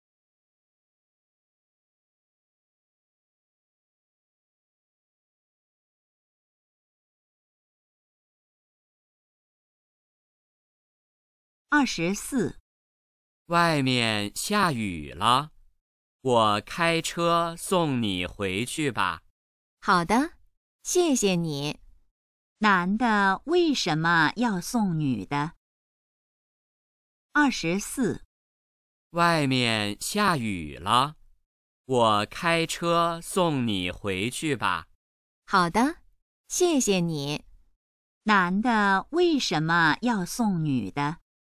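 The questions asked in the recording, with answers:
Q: 男的为什么要送女的?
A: 外面下雨了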